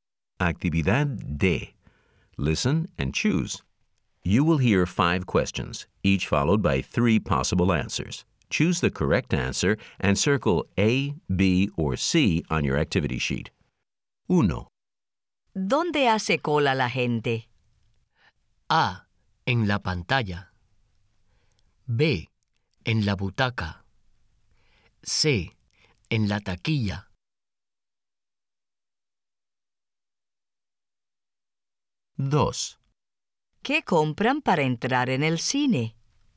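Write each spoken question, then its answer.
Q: ¿Dónde hace cola la gente?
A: C: En la taquilla.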